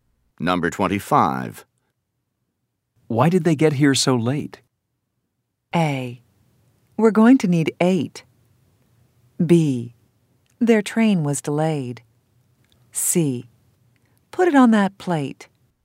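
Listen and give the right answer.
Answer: B: Their train was delayed.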